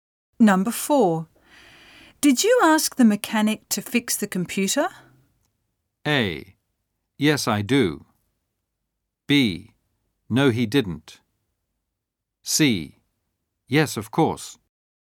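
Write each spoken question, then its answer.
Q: Did you ask the mechanic to fix the computer?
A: C: Yes, of course.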